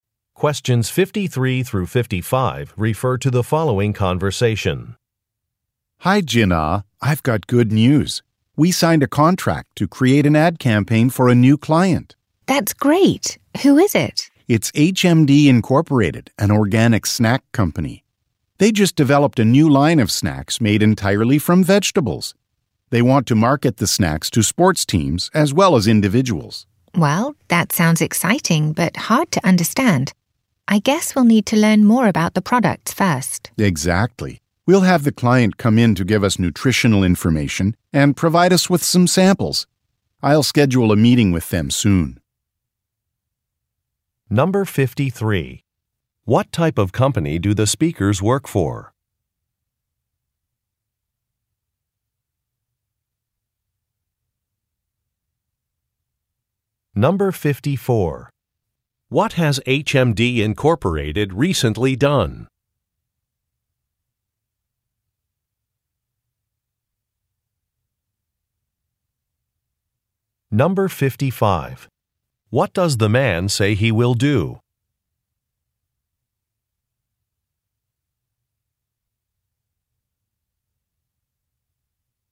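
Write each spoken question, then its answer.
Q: What type of company do the speakers work for?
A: An advertising company

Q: What has HMD Incorporated recently done?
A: Developed a new line of snacks made entirely from vegetables

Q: What does the man say he will do?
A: Schedule a meeting with the client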